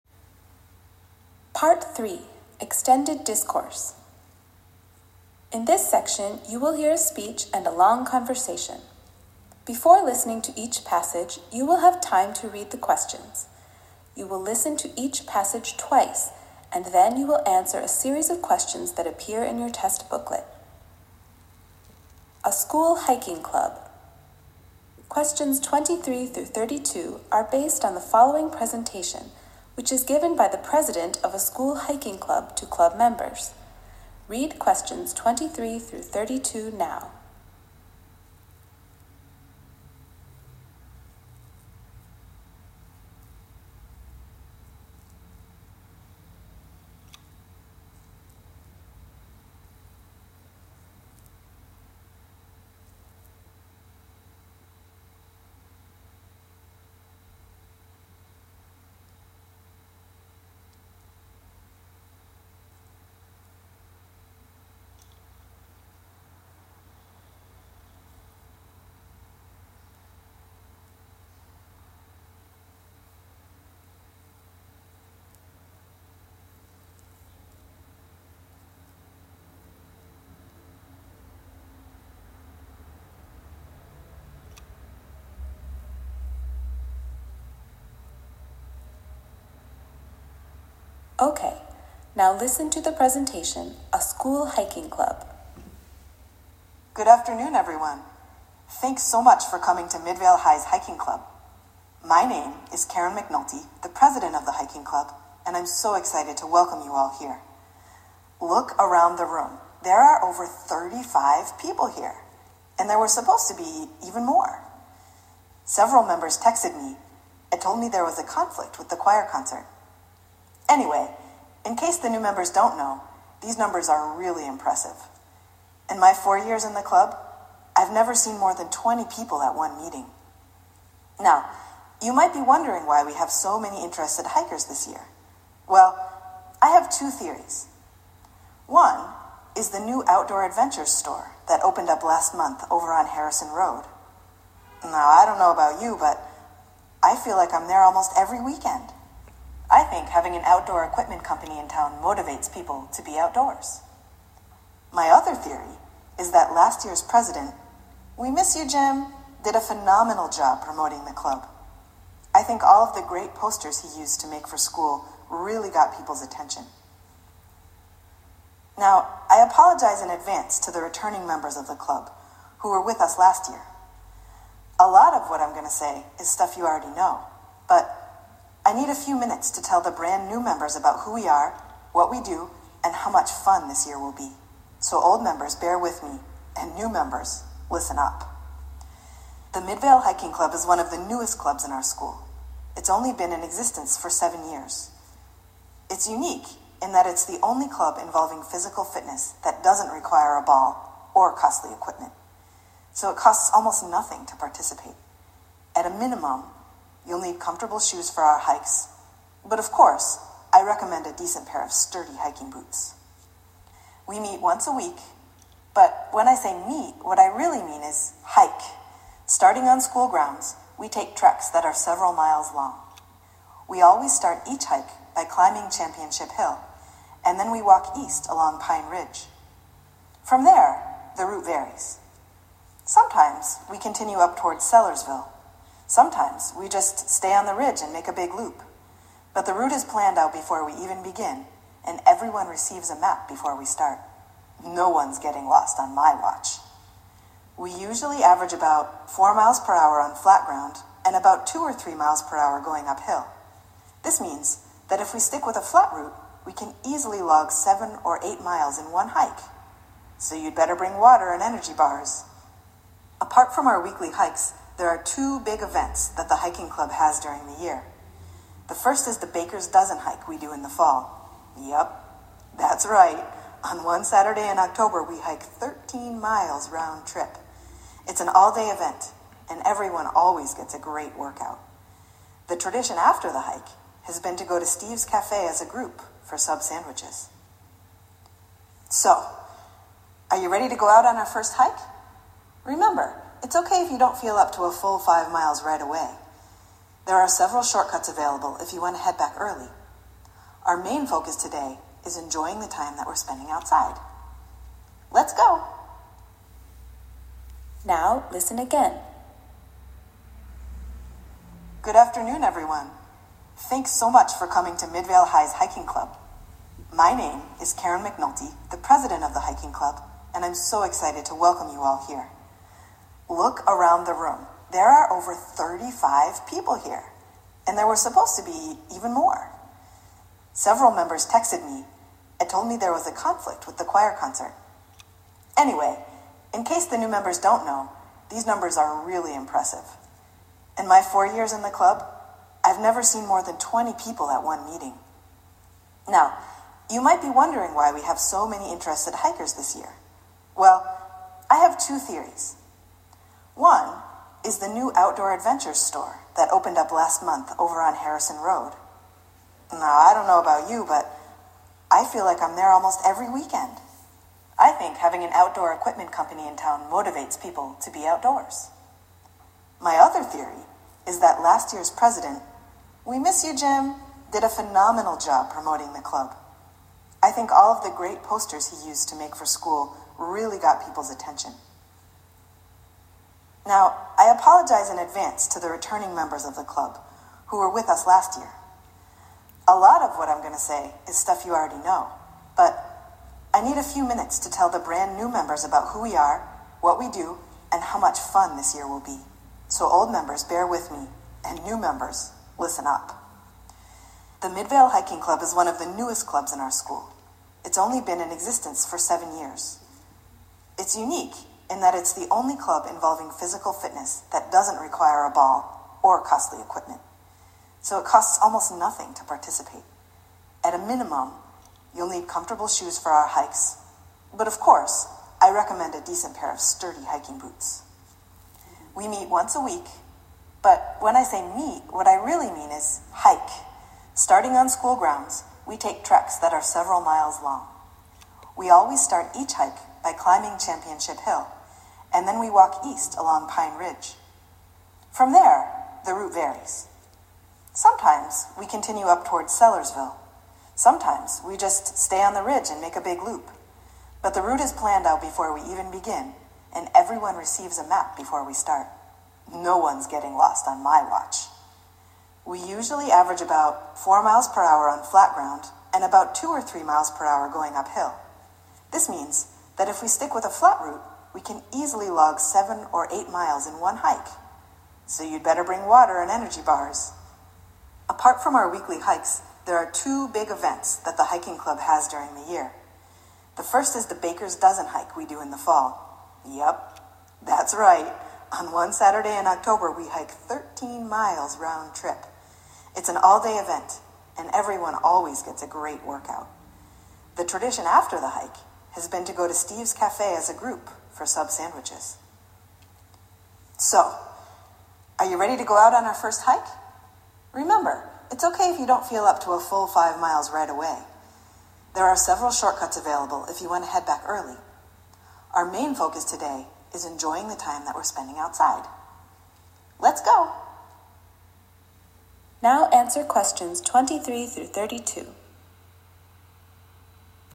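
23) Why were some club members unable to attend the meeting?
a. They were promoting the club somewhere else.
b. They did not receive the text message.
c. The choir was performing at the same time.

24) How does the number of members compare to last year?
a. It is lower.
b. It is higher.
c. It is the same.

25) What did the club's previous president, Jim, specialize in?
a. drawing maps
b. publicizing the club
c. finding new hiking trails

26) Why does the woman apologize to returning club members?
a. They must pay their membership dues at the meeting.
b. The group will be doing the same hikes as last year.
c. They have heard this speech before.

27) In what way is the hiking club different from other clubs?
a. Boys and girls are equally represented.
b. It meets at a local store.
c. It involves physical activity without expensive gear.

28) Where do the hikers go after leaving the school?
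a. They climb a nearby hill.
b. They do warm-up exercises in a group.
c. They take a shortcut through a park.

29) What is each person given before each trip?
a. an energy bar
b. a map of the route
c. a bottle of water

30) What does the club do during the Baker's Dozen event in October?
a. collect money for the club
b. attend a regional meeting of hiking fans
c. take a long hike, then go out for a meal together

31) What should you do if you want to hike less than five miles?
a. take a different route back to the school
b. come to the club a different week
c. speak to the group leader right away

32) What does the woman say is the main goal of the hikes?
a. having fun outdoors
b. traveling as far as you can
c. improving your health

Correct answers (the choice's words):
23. The choir was performing at the same time.
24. It is higher.
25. publicizing the club
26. They have heard this speech before.
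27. It involves physical activity without expensive gear.
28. They climb a nearby hill.
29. a map of the route
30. take a long hike, then go out for a meal together
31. take a different route back to the school
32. having fun outdoors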